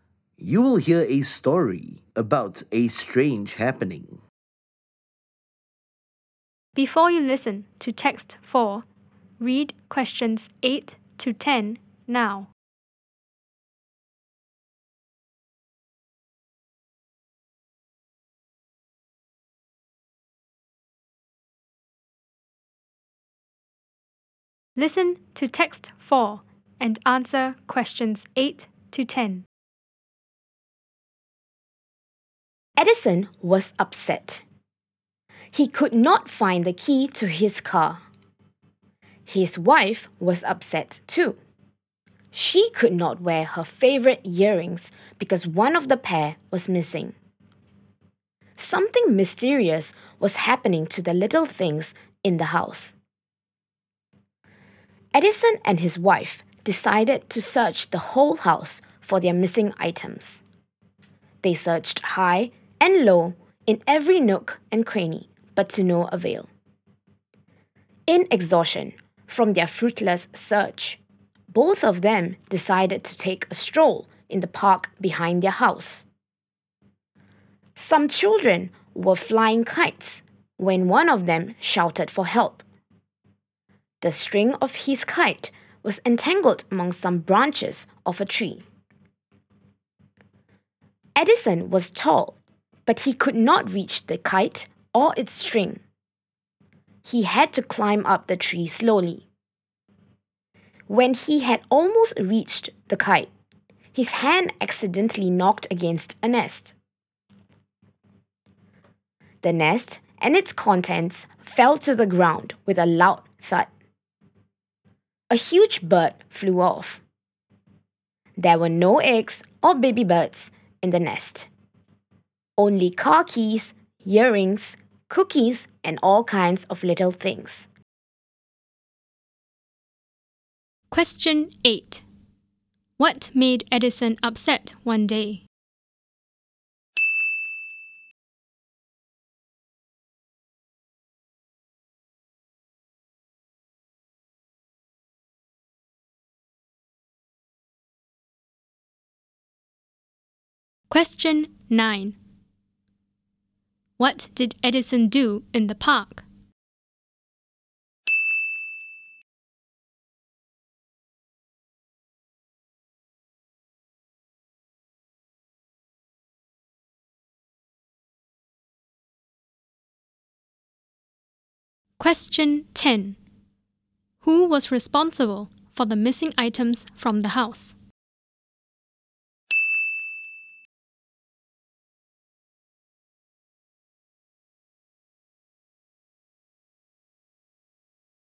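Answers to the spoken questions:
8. He could not find his car key.
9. He climbed a tree to help a child get a kite.
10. A huge bird.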